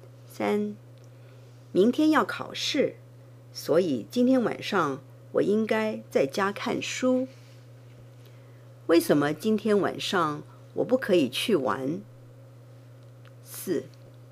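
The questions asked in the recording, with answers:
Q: 为什么今天晚上我不可以去玩?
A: 因为明天要考试,应该在家看书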